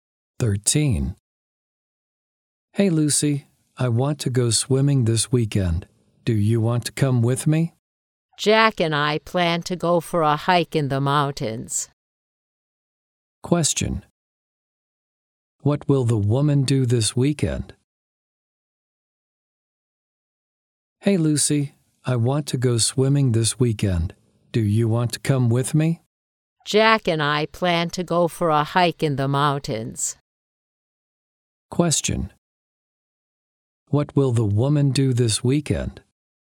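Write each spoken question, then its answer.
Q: What will the woman do this weekend?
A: Go hiking in the mountains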